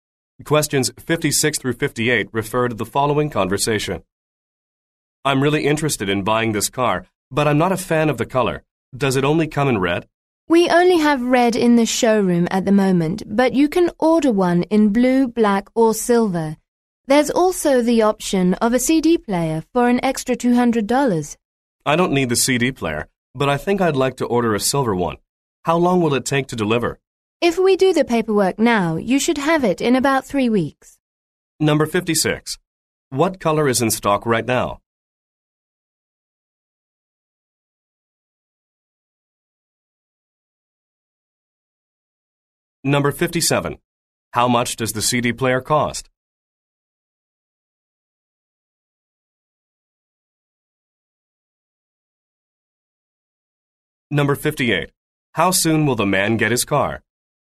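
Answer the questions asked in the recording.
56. Red
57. $200
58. In about 3 weeks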